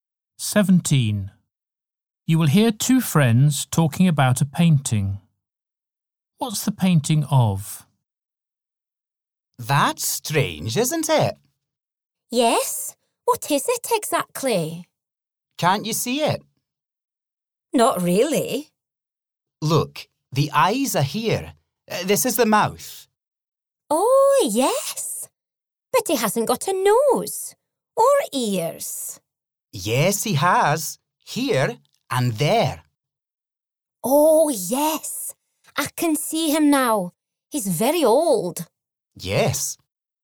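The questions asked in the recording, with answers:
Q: What's the painting of?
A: An old man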